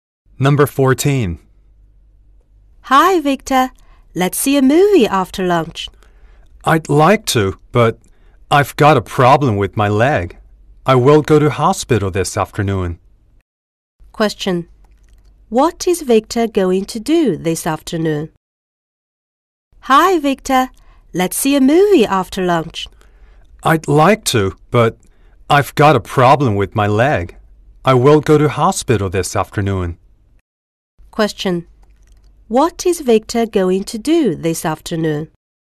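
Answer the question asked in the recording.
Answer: Go to hospital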